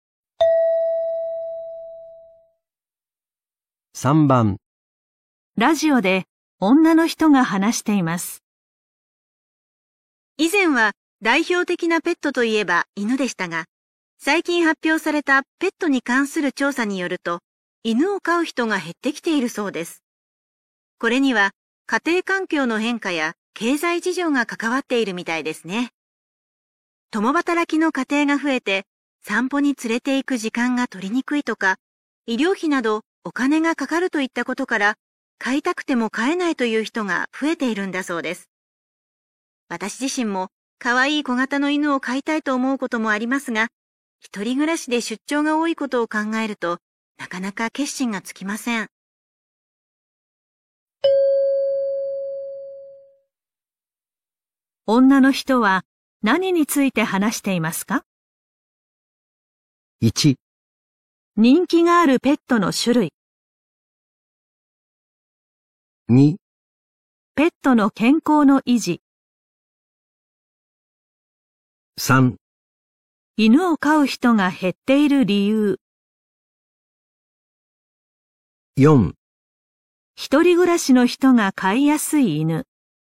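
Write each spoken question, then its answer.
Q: 女の人は何について話していますか?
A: 3: 犬を飼う人が減っている理由。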